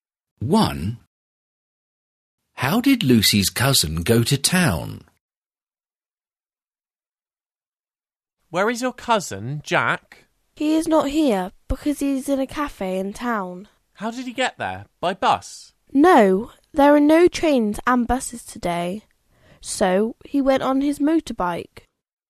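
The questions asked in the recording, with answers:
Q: How did Lucy's cousin go to town?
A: On his motorbike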